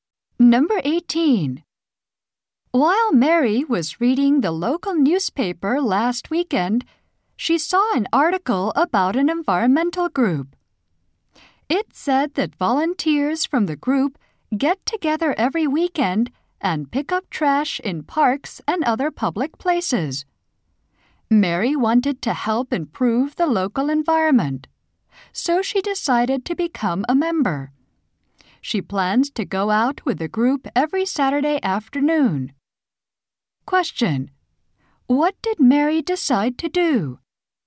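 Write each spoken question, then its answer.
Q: What did Mary decide to do?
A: Join an environmental group that picks up trash.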